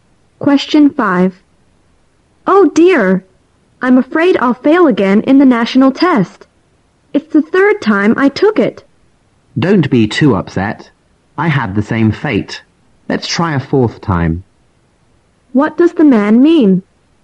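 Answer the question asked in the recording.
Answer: He also failed, and they should both try again.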